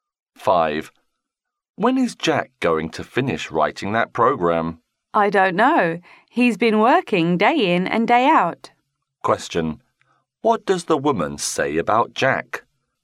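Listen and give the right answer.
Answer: He has been working very hard, day and night.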